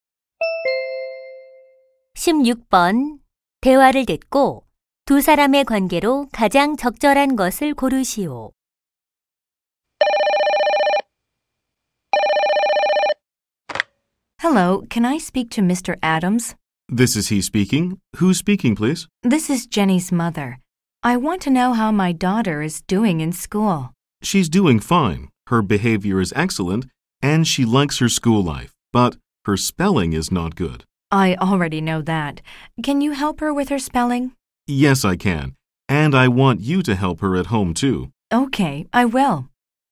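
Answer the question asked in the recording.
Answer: 교사와 학부모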